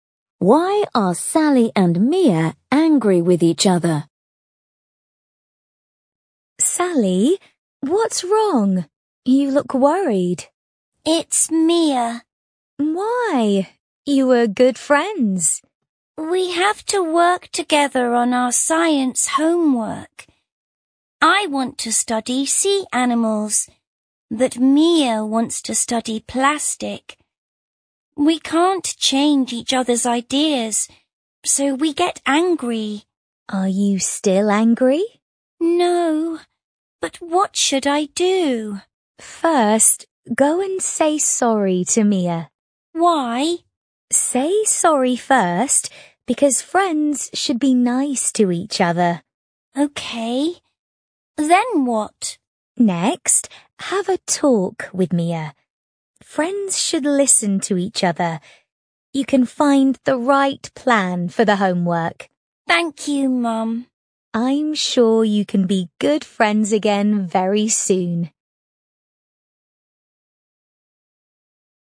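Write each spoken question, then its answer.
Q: Why are Sally and Mia angry with each other?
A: They can't agree on their science homework topic: Sally wants to study sea animals, but Mia wants to study plastic.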